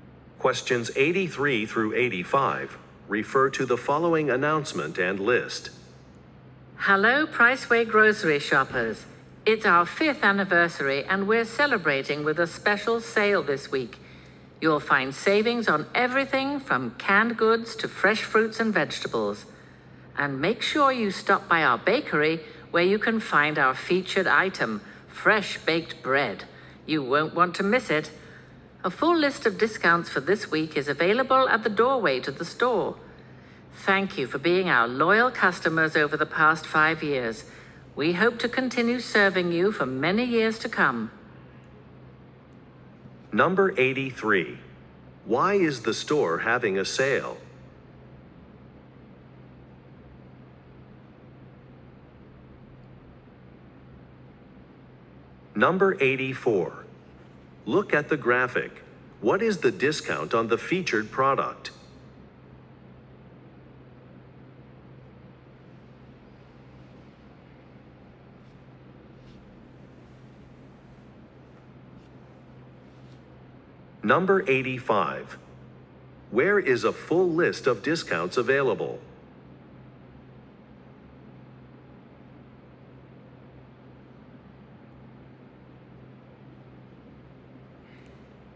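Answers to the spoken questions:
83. To celebrate its fifth anniversary
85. At the doorway to the store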